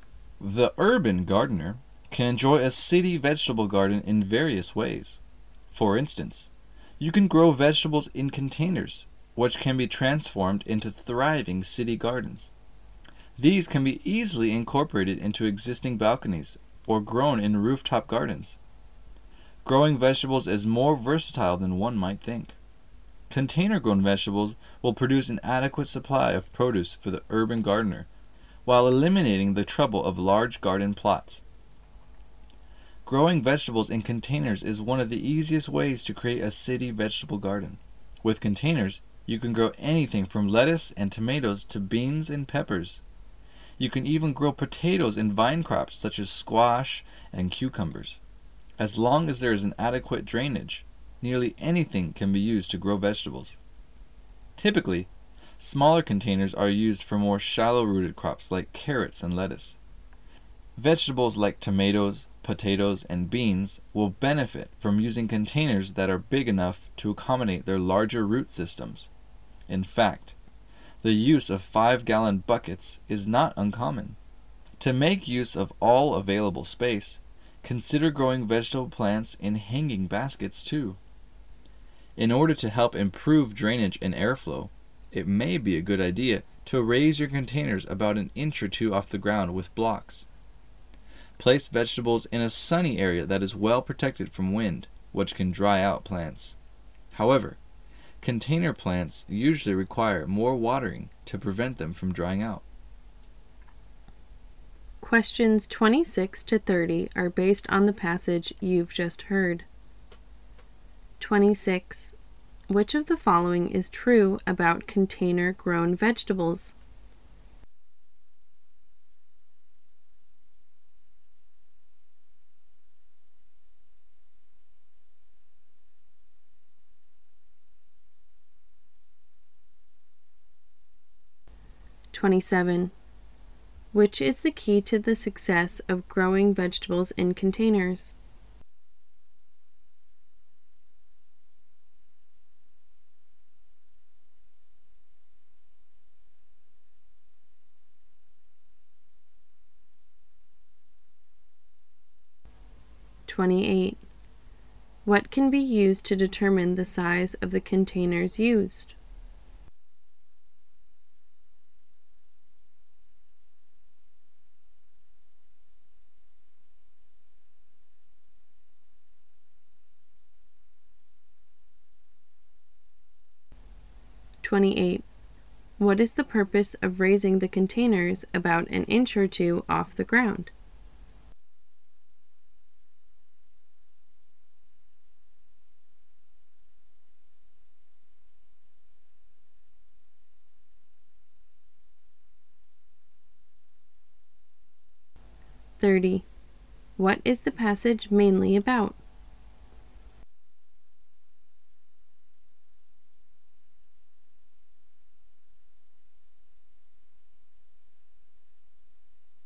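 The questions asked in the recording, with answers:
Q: What is the purpose of raising the containers about an inch or two off the ground?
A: To improve drainage and airflow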